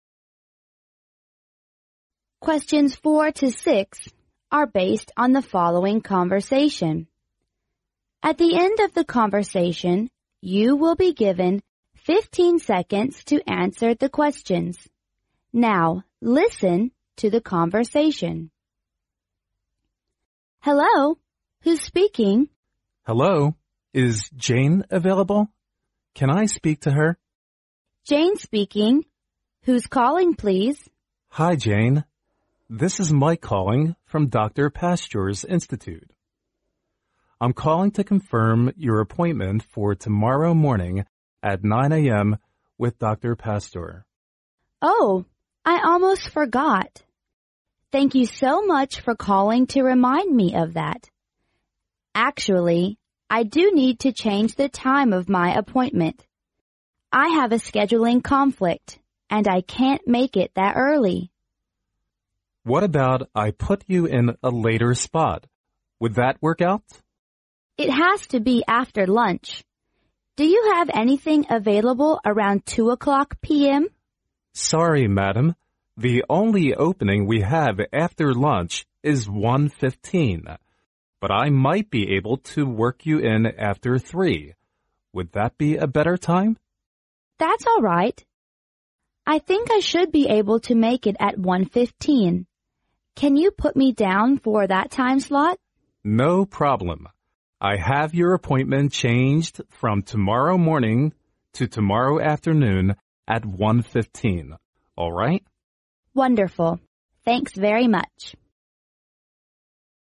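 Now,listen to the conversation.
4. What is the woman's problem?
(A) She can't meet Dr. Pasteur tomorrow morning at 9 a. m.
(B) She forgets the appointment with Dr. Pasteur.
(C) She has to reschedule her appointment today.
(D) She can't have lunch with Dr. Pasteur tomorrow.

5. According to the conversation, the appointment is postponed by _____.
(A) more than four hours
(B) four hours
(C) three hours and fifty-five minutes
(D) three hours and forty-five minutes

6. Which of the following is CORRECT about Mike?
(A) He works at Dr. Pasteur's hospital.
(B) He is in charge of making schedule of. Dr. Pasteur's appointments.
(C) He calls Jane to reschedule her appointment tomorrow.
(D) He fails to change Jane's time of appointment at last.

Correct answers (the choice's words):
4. She can't meet Dr. Pasteur tomorrow morning at 9 a. m.
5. more than four hours
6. He is in charge of making schedule of. 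Dr. Pasteur's appointments.

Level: 专业四级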